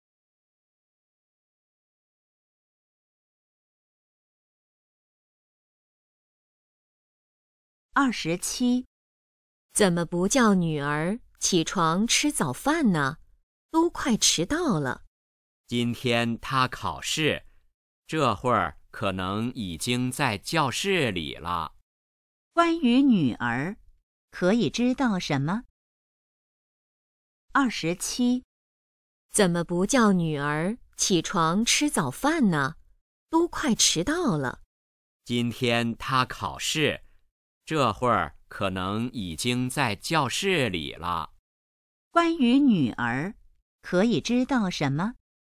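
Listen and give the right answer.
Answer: 今天考试,可能已经在教室了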